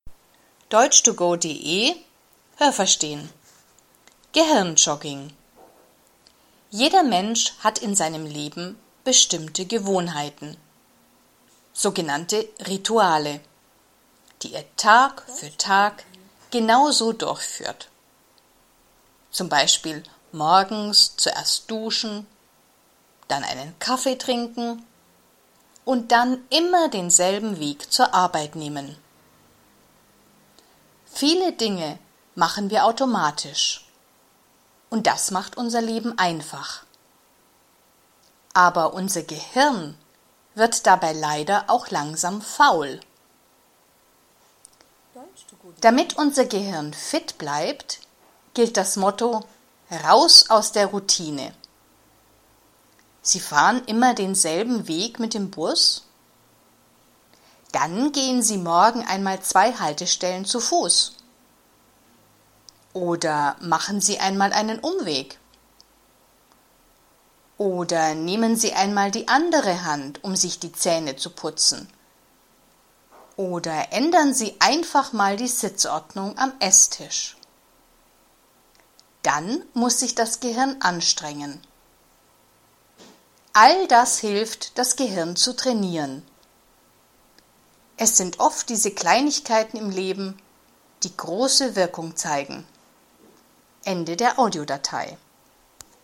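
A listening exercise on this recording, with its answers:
Was haben Sie gehört? Es gibt nur eine korrekte Antwort.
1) Was sind „Rituale"?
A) bestimmte Gewohnheiten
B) tägliche Probleme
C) die vielen Tage im Leben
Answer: bestimmte Gewohnheiten

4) Was bedeutet „Raus aus der Routine"?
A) Dinge automatisch machen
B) Dinge nicht automatisch machen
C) Das Leben positiv sehen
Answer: Dinge nicht automatisch machen

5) Man kann das Gehirn trainieren, wenn man ...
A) so oft wie möglich zu Fuß zur Arbeit geht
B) direkt zur Arbeit geht und keinen Umweg macht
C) nicht immer den gleichen Weg zur Arbeit nimmt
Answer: nicht immer den gleichen Weg zur Arbeit nimmt

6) Man kann das Gehirn auch trainieren, wenn man ...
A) sich regelmäßig die Zähne putzt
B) beim Essen nicht immer am gleichen Platz sitzt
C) regelmäßig und viel isst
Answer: beim Essen nicht immer am gleichen Platz sitzt

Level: A2

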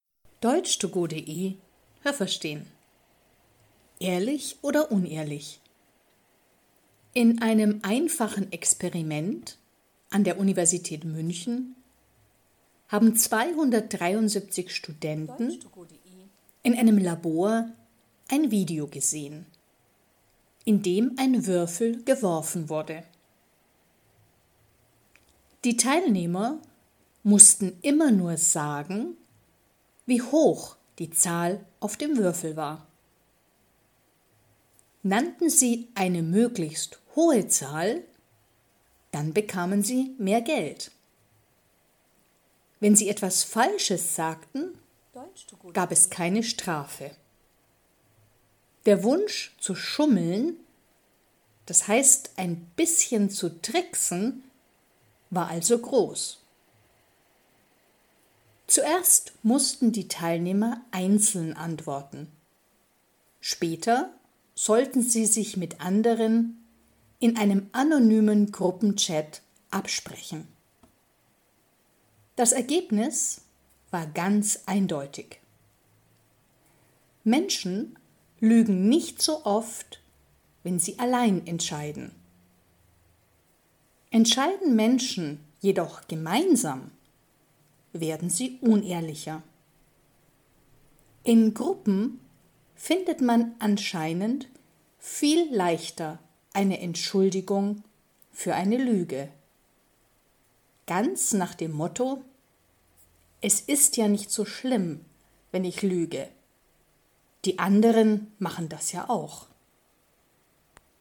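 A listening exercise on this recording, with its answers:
Was haben Sie gehört? Es gibt nur eine korrekte Antwort.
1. Das Experiment fand an der Universität _____ statt.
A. München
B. Münster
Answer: München

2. Studenten _____ , in dem gewürfelt wurde.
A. saßen in einem Lokal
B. sahen einen Film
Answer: sahen einen Film

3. Die Teilnehmer mussten sagen, ...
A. welche Zahl der Würfel zeigte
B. wie viel Geld sie für den Würfel zahlten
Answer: welche Zahl der Würfel zeigte

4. Wann bekamen die Teilnehmer mehr Geld? Wenn der Würfel ...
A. die Zahl 6 zeigte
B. die Zahl 1 zeigte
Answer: die Zahl 6 zeigte

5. Was passierte, wenn sie etwas Falsches sagten?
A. Sie bekamen eine Strafe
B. nichts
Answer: nichts

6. Die Menschen sind ehrlicher, wenn sie _____ entscheiden.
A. allein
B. in einer Gruppe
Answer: allein

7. Man lügt schneller in einer Gruppe, ...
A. weil man sich dann bei den anderen immer entschuldigen kann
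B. weil auch die anderen lügen, und das ist dann eine Entschuldigung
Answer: weil auch die anderen lügen, und das ist dann eine Entschuldigung

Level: A2

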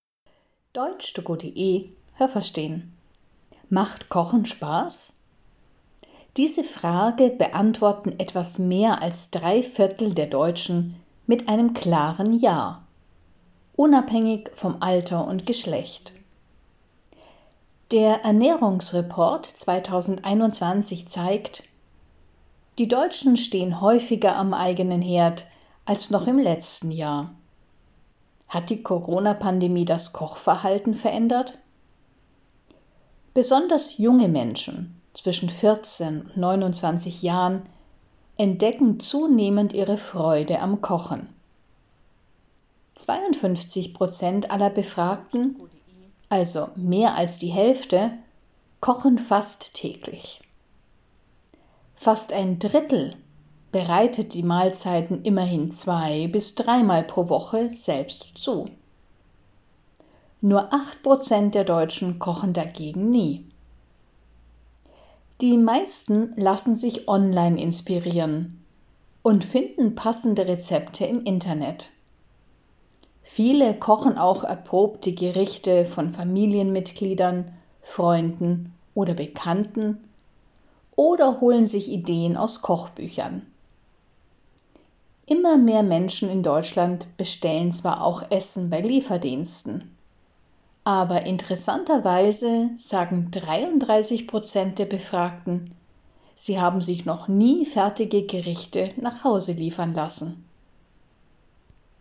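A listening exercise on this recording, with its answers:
Was haben Sie gehört? Es gibt nur eine korrekte Antwort.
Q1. Etwas mehr als _____ aller Deutschen kochen gerne.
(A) drei Viertel (= 75 %)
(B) 43 Prozent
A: drei Viertel (= 75 %)

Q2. Der Ernährungsreport 2021 zeigt, dass die Deutschen inzwischen _____ selber kochen.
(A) seltener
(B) öfter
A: öfter

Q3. Besonders _____ zwischen 14 und 29 Jahren kochen immer häufiger.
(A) junge Männer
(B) junge Menschen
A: junge Menschen

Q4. Mehr als 50 Prozent aller Befragten ...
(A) kochen fast täglich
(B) kochen zwei- bis dreimal pro Woche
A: kochen fast täglich

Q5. _____ der Deutschen kochen nie.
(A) 18 Prozent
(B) 8 Prozent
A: 8 Prozent

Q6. Die meisten finden Rezeptideen ...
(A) im Internet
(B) in Kochbüchern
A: im Internet

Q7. 33 Prozent der Deutschen ...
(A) bestellen regelmäßig Essen bei Lieferdiensten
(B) haben noch nie Essen bei Lieferdiensten bestellt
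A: haben noch nie Essen bei Lieferdiensten bestellt

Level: B1

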